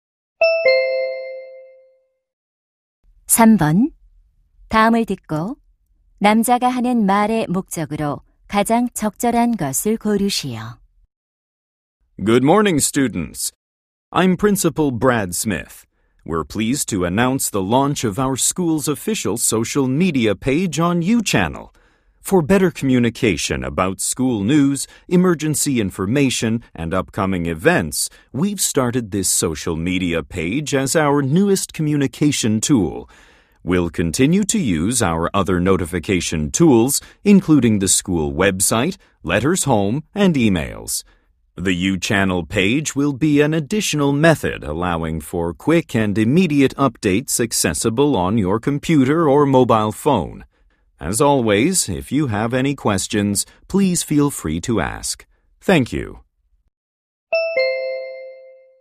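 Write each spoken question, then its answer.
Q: 다음을 듣고 남자가 하는 말의 목적으로 가장 적절한 것을 고르시오.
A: 학교 공식 소셜 미디어 페이지 개설을 알리려고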